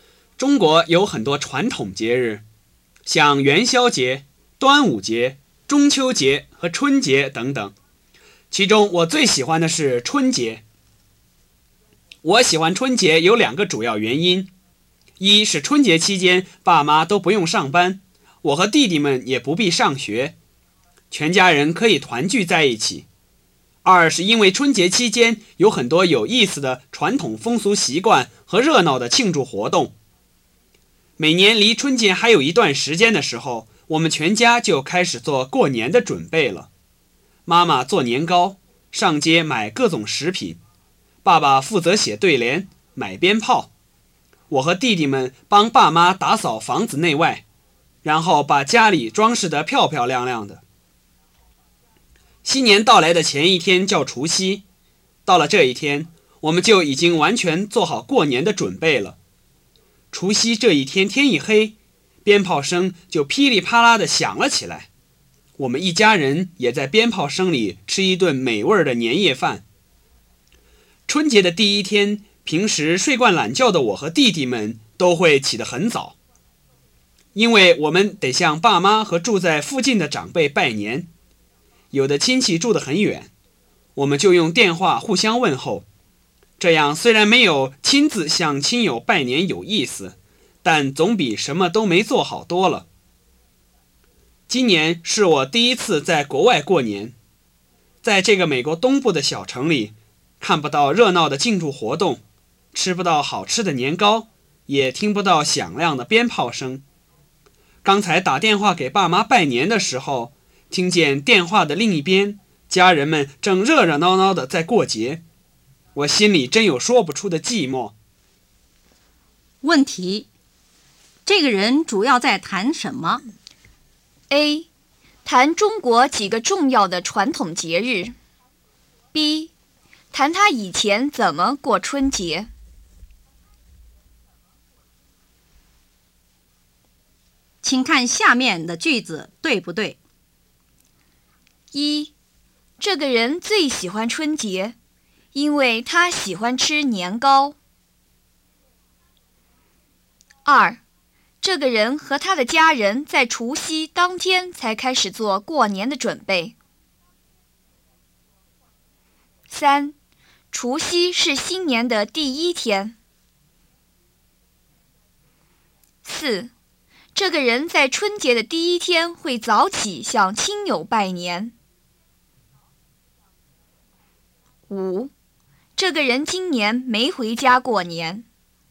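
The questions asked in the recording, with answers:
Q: 这个人主要在谈什么?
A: B: 谈他以前怎么过春节。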